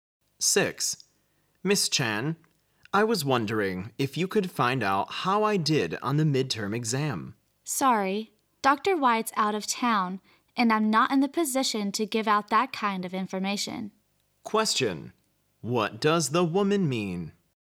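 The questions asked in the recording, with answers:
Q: What does the woman mean?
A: She can't tell him his midterm exam result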